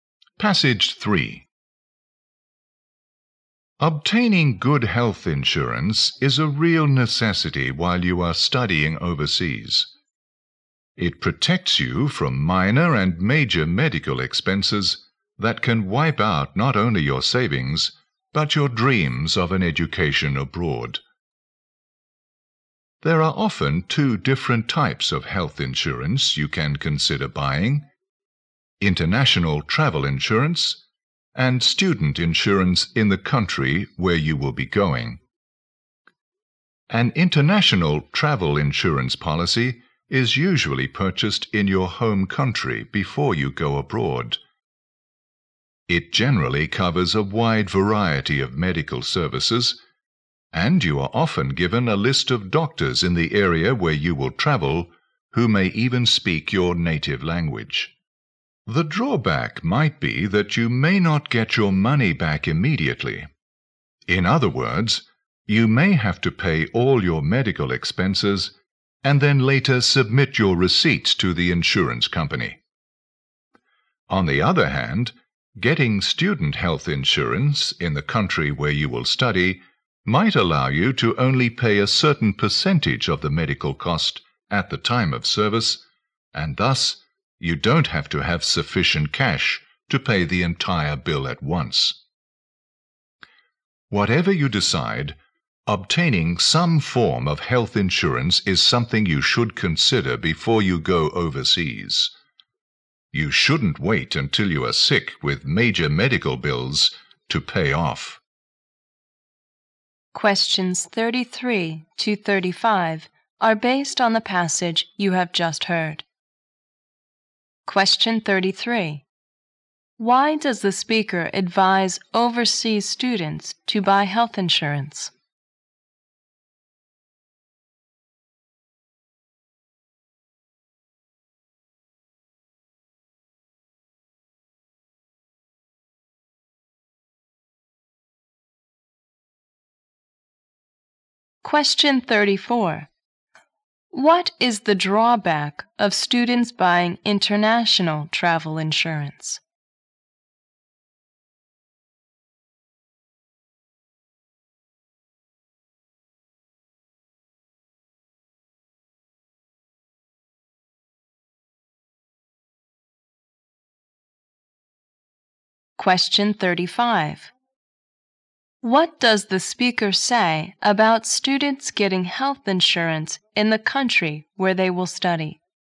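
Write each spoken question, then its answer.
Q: Why does the speaker advise overseas students to buy health insurance?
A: Medical expenses could wipe out their savings and their dream of studying abroad.

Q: What is the drawback of students buying international travel insurance?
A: They may have to pay their medical expenses first and be paid back later.

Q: What does the speaker say about students getting health insurance in the country where they will study?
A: They may only have to pay a percentage of the cost at the time of service.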